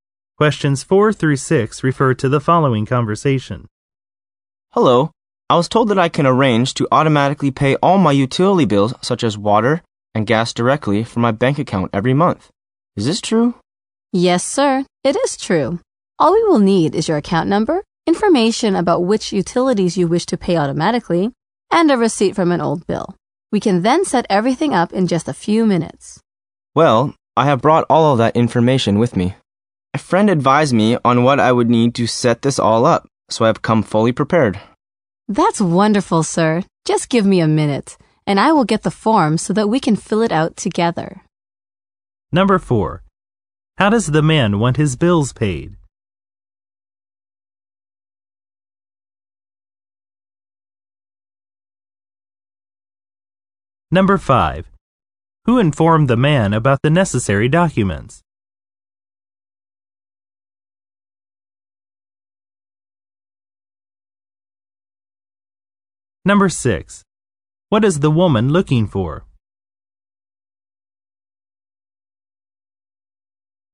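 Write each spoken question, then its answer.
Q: How does the man want his bills paid?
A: Automatically from his bank account

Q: Who informed the man about the necessary documents?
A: A friend

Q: What is the woman looking for?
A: A form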